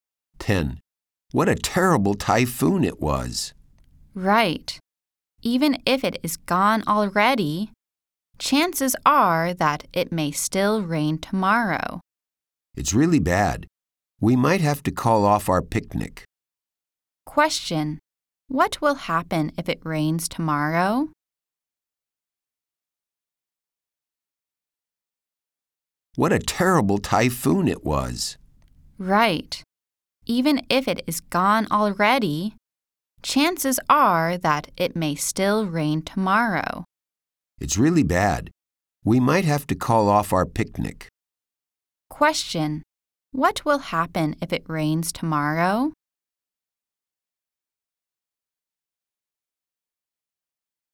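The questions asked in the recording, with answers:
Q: What will happen if it rains tomorrow?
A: They might call off their picnic.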